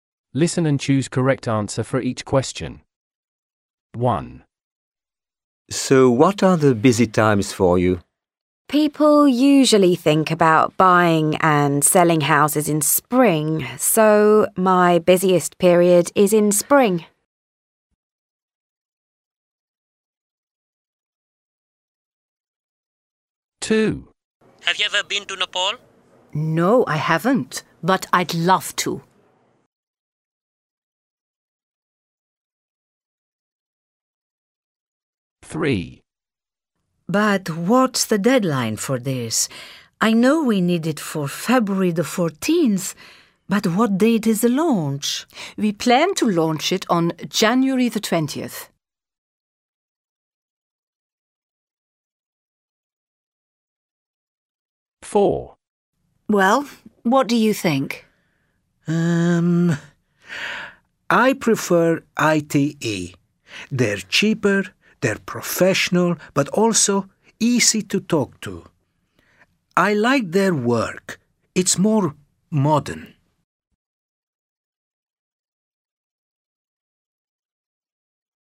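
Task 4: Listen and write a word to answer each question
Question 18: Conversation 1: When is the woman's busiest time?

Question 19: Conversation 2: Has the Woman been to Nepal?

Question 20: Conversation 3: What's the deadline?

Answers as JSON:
{"18": "spring", "19": "No", "20": "February 14th"}

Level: A1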